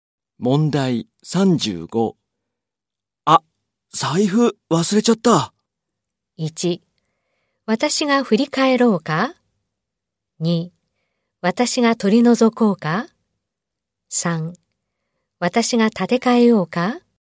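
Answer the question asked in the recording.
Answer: 3: 私が立て替えようか?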